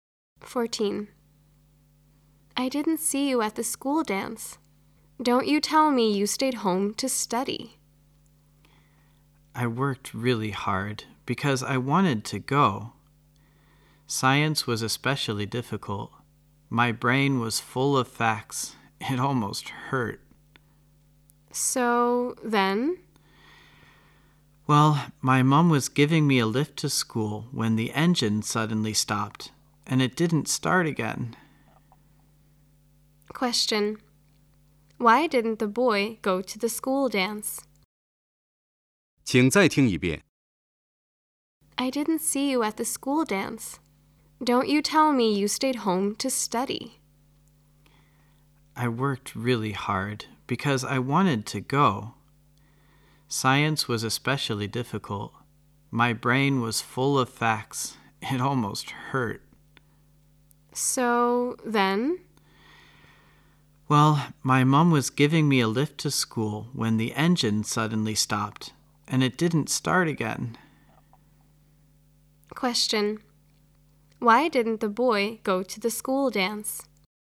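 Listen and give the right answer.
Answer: His mom's car broke down on the way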